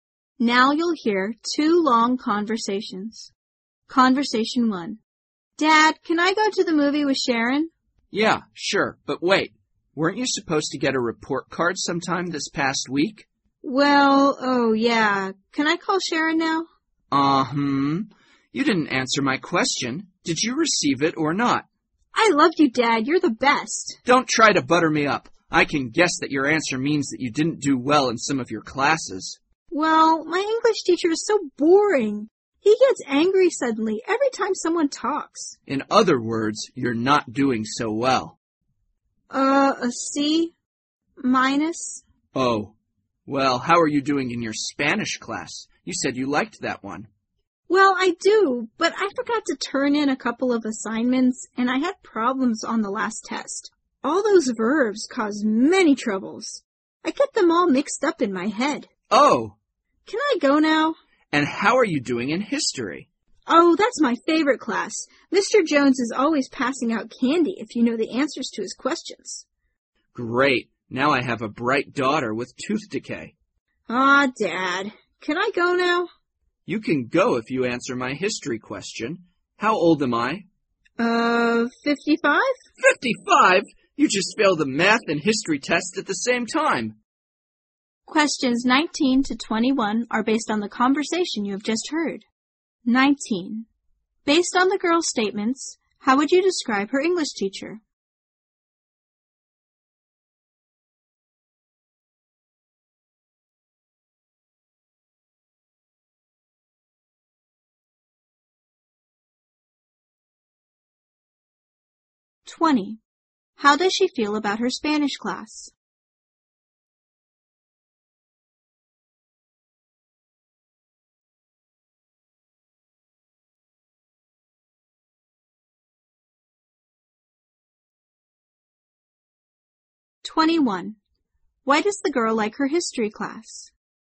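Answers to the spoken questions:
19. Boring and quick to get angry.
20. She likes it but is having problems with it.
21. The teacher passes out candy for right answers.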